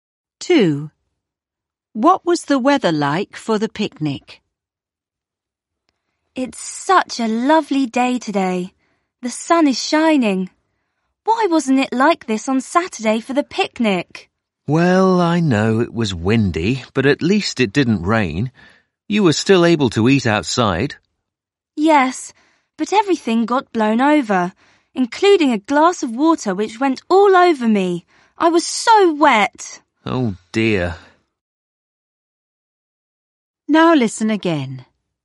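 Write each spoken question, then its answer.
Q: What was the weather like for the picnic?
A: Windy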